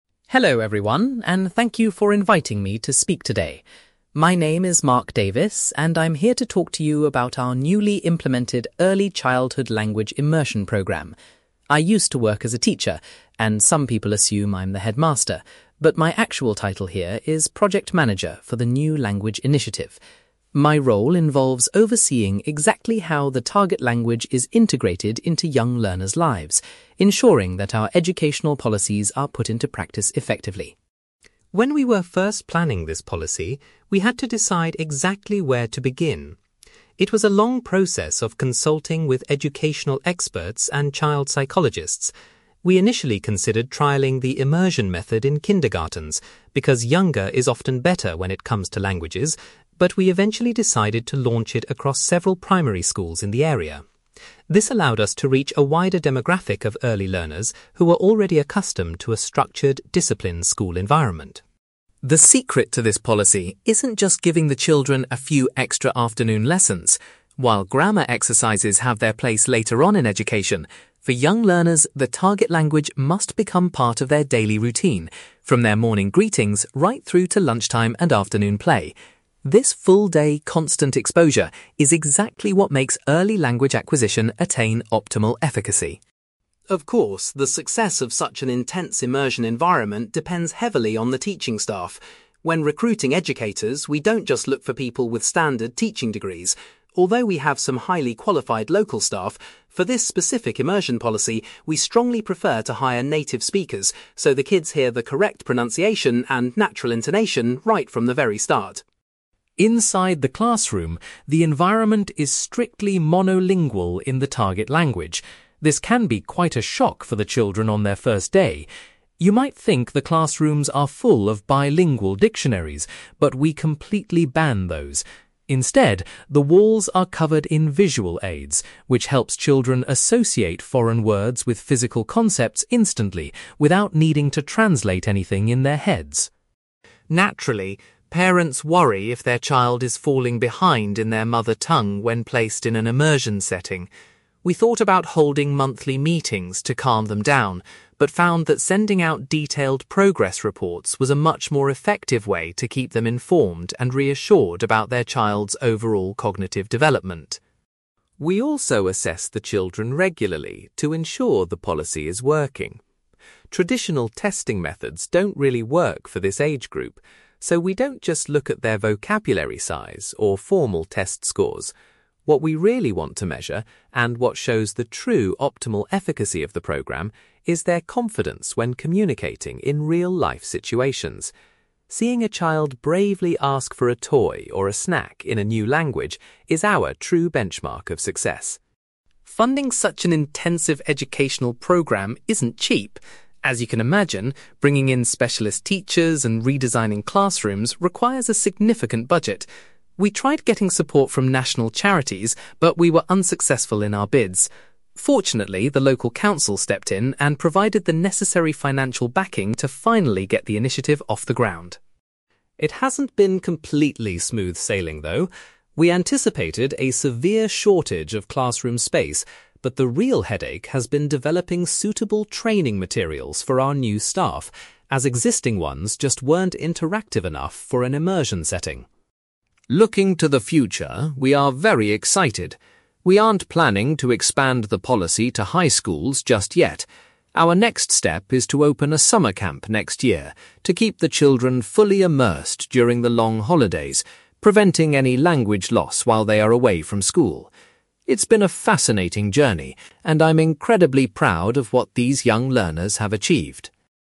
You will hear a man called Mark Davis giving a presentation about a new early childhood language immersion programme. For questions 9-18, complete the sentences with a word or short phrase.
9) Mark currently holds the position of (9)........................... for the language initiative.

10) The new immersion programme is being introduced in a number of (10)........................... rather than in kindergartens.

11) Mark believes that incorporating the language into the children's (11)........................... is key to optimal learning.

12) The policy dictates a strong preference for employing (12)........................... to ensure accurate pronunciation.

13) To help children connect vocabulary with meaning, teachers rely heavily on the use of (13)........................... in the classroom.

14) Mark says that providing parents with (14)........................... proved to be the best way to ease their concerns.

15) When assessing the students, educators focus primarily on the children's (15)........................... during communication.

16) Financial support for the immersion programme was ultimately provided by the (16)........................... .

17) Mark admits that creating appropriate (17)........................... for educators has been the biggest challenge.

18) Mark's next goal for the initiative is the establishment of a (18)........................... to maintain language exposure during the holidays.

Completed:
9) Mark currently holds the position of project manager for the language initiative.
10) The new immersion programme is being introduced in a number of primary schools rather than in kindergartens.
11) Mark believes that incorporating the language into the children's daily routine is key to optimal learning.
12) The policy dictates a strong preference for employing native speakers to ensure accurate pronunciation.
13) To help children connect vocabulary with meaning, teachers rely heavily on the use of visual aids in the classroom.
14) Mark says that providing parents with progress reports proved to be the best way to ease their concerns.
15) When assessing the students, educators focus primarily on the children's confidence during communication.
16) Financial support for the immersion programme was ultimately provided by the local council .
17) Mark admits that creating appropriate training materials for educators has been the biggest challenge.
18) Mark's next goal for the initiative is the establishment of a summer camp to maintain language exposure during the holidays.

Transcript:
Mark: Hello everyone, and thank you for inviting me to speak today. My name is Mark Davis, and I'm here to talk to you about our newly implemented early childhood language immersion programme. I used to work as a teacher, and some people assume I'm the headmaster, but my actual title here is project manager for the new language initiative. My role involves overseeing exactly how the target language is integrated into young learners' lives, ensuring that our educational policies are put into practice effectively.
When we were first planning this policy, we had to decide exactly where to begin. It was a long process of consulting with educational experts and child psychologists. We initially considered trialing the immersion method in kindergartens, because younger is often better when it comes to languages, but we eventually decided to launch it across several primary schools in the area. This allowed us to reach a wider demographic of early learners who were already accustomed to a structured, disciplined school environment.
The secret to this policy isn't just giving the children a few extra afternoon lessons. While grammar exercises have their place later on in education, for young learners, the target language must become part of their daily routine, from their morning greetings right through to lunch time and afternoon play. This full-day constant exposure is exactly what makes early language acquisition attain optimal efficacy.
Of course, the success of such an intense immersion environment depends heavily on the teaching staff. When recruiting educators, we don't just look for people with standard teaching degrees. Although we have some highly qualified local staff, for this specific immersion policy, we strongly prefer to hire native speakers so the kids hear the correct pronunciation and natural intonation right from the very start.
Inside the classroom, the environment is strictly monolingual in the target language. This can be quite a shock for the children on their first day! You might think the classrooms are full of bilingual dictionaries, but we completely ban those. Instead, the walls are covered in visual aids, which helps children associate foreign words with physical concepts instantly without needing to translate anything in their heads.
Naturally, parents worry if their child is falling behind in their mother tongue when placed in an immersion setting. We thought about holding monthly meetings to calm them down, but found that sending out detailed progress reports was a much more effective way to keep them informed and reassured about their child's overall cognitive development.
We also assess the children regularly to ensure the policy is working. Traditional testing methods don't really work for this age group, so we don't just look at their vocabulary size or formal test scores. What we really want to measure, and what shows the true optimal efficacy of the program, is their confidence when communicating in real-life situations. Seeing a child bravely ask for a toy or a snack in a new language is our true benchmark of success.
Funding such an intensive educational programme isn't cheap. As you can imagine, bringing in specialist teachers and redesigning classrooms requires a significant budget. We tried getting support from national charities, but we were unsuccessful in our bids. Fortunately, the local council stepped in and provided the necessary financial backing to finally get the initiative off the ground.
It hasn't been completely smooth sailing, though. We anticipated a severe shortage of classroom space, but the real headache has been developing suitable training materials for our new staff, as existing ones just weren't interactive enough for an immersion setting.
Looking to the future, we are very excited. We aren't planning to expand the policy to high schools just yet. Our next step is to open a summer camp next year to keep the children fully immersed during the long holidays, preventing any language loss while they are away from school. It's been a fascinating journey, and I'm incredibly proud of what these young learners have achieved.

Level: B2